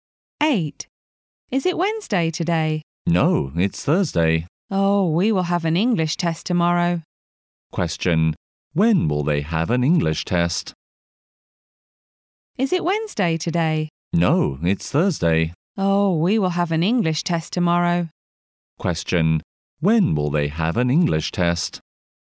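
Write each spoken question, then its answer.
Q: When will they have an English test?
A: On Friday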